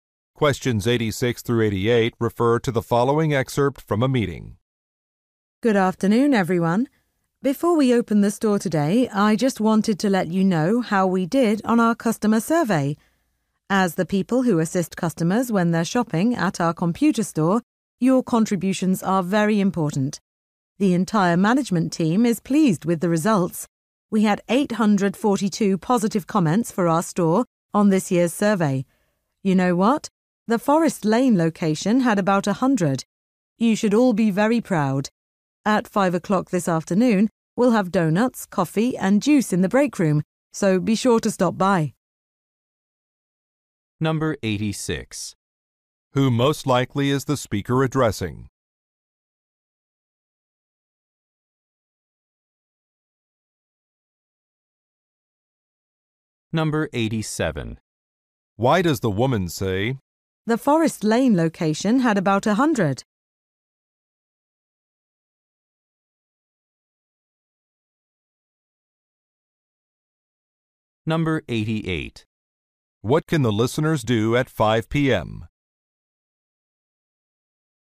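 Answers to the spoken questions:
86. Salespeople at a computer store
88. Have refreshments in the break room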